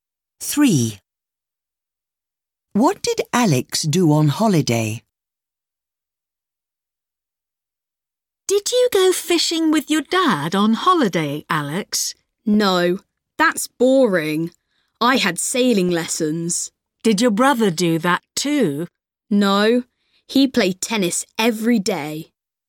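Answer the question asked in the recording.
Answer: He had sailing lessons.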